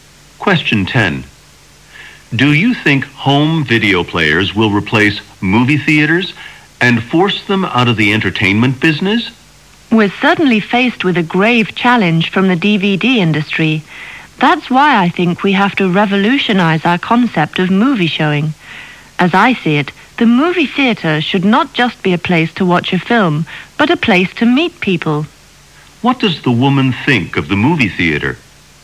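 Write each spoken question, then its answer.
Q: What does the woman think of the movie theater?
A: It should also be a place to meet people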